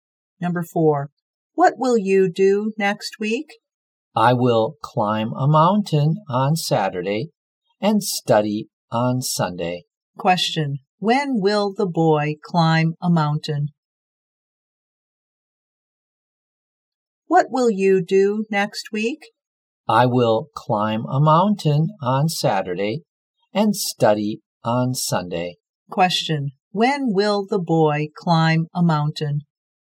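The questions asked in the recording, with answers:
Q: when will the boy climb a mountain?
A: On Saturday.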